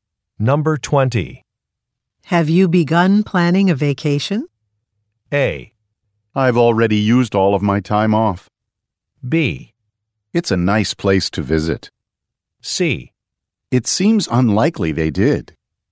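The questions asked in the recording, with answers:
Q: Have you begun planning a vacation?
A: A: I've already used all of my time off.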